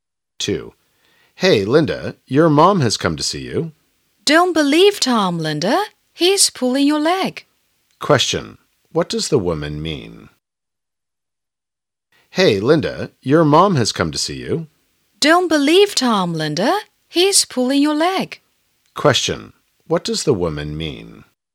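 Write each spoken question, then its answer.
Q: Question. What does the woman mean?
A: Tom is joking; Linda's mom hasn't come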